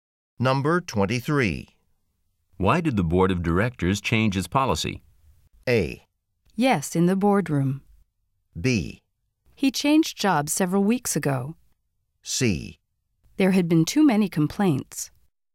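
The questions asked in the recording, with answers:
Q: Why did the board of directors change its policy?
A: C: There had been too many complaints.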